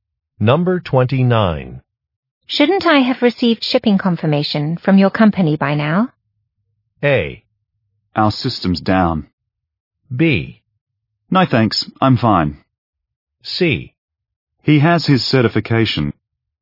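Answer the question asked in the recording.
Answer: A: Our system's down.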